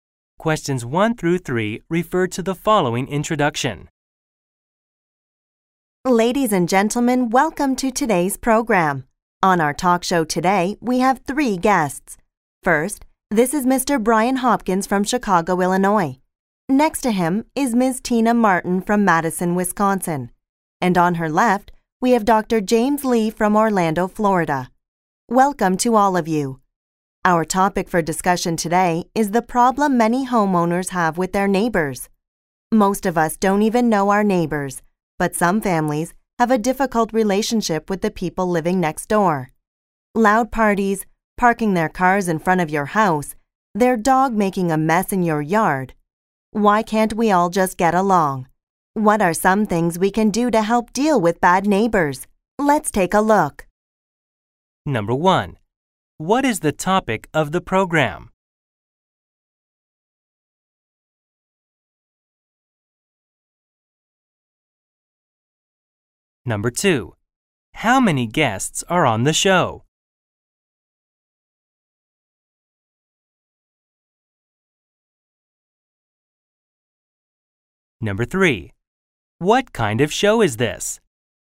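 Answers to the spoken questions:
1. Problems homeowners have with their neighbors
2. Three
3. A talk show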